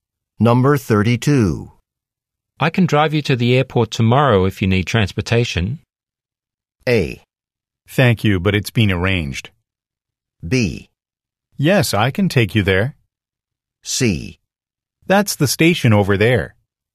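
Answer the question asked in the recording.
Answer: A: Thank you, but it's been arranged.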